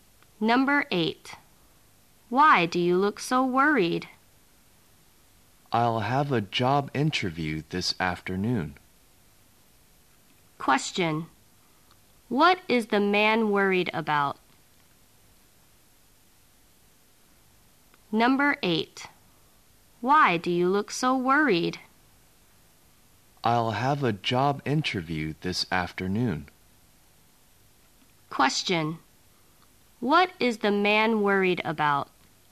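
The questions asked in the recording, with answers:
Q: What is the man worried about?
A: His job interview this afternoon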